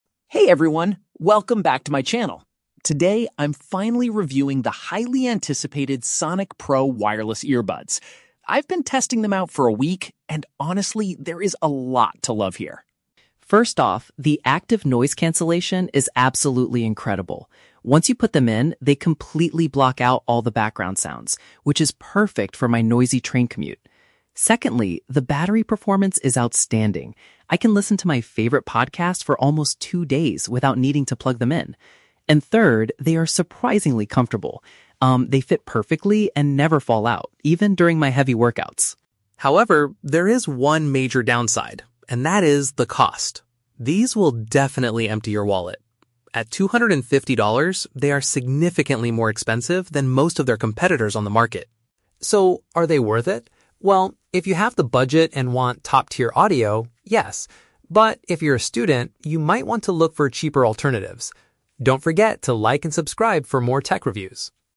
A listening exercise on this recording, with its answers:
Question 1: What is one of the main advantages of the Sonic Pro earbuds?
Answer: They can eliminate outside noise.

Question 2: How does the vlogger describe his experience wearing the earbuds at the gym?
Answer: They stay securely in his ears.

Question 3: What is the vlogger's main complaint about the product?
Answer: They have a very high price tag.

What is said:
Alex: Hey everyone, welcome back to my channel. Today, I'm finally reviewing the highly anticipated Sonic Pro wireless earbuds. I've been testing them out for a week, and honestly, there is a lot to love here.
First off, the active noise cancellation is absolutely incredible. Once you put them in, they completely block out all the background sounds, which is perfect for my noisy train commute. Secondly, the battery performance is outstanding. I can listen to my favorite podcasts for almost two days without needing to plug them in. And third, they are surprisingly comfortable. Um, they fit perfectly and never fall out, even during my heavy workouts.
However, there is one major downside, and that is the cost. These will definitely empty your wallet. At two hundred and fifty dollars, they are significantly more expensive than most of their competitors on the market.
So, are they worth it? Well, if you have the budget and want top-tier audio, yes. But if you're a student, you might want to look for cheaper alternatives. Don't forget to like and subscribe for more tech reviews!